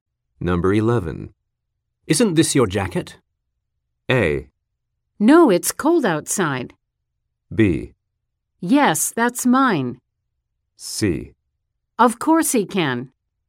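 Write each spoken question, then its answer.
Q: Isn't this your jacket?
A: B: Yes, that's mine.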